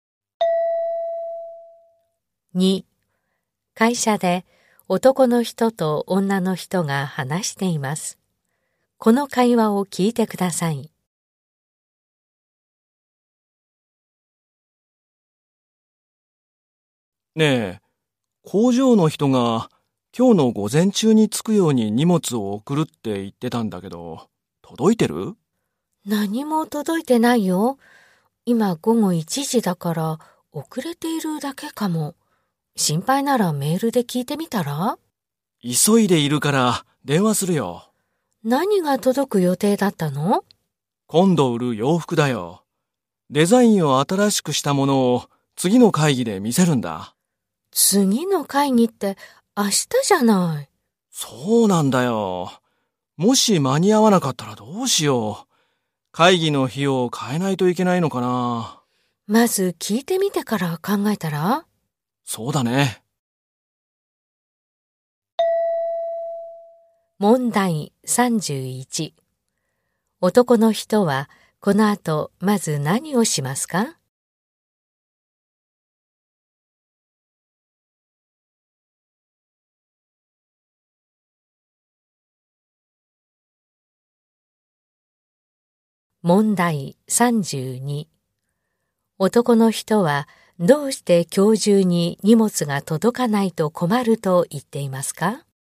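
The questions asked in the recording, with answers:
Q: 男の人はこの後まず何をしますか?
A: 工場に電話する

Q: 男の人はどうして今日中に荷物が届かないと困ると言っていますか?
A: 明日の会議で新しいデザインの洋服を見せるから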